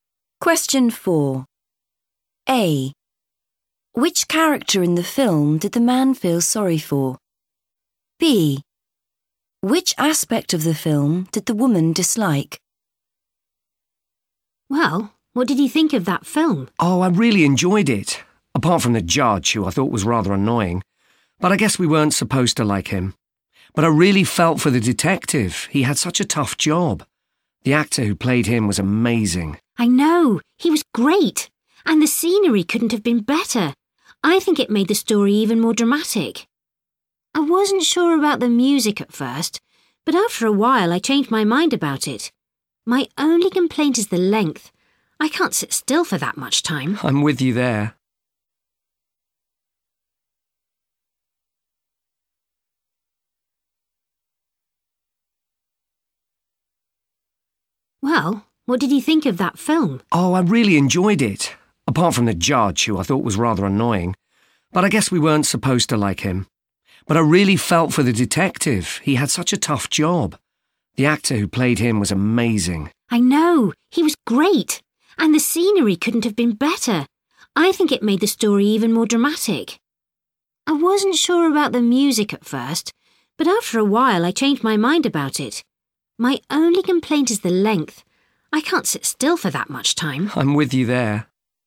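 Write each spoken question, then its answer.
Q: Which character in the film did the man feel sorry for?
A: the detective

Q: Which aspect of the film did the woman dislike?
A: the length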